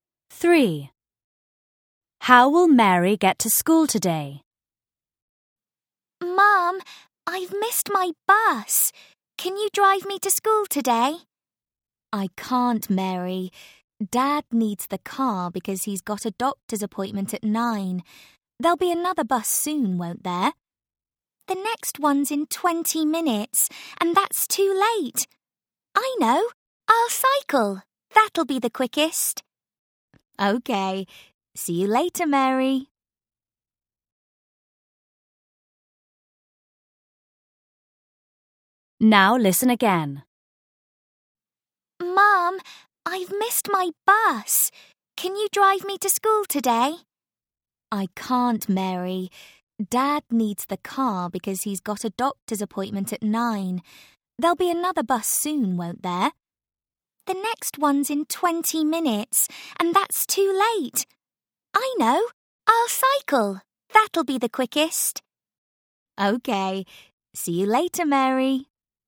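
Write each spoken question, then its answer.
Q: How will Mary get to school today?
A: by bike (she'll cycle)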